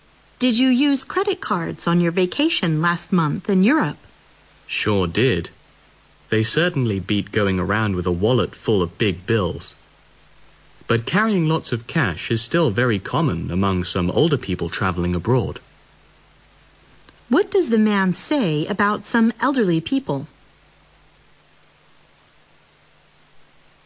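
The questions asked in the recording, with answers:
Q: What does the man say about some elderly people?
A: Many of them still carry lots of cash when traveling abroad.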